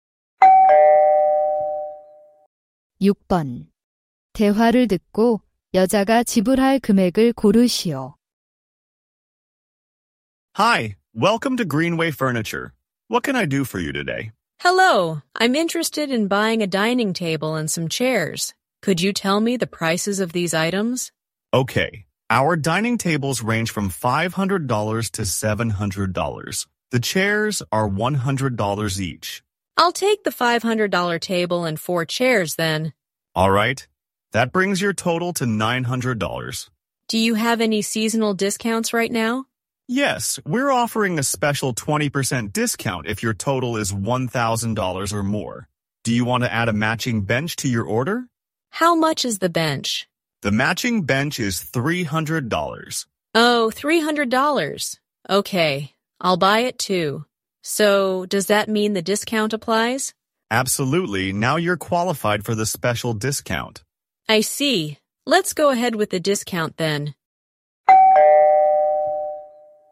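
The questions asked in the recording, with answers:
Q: 대화를 듣고 여자가 지불할 금액을 고르시오.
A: 960달러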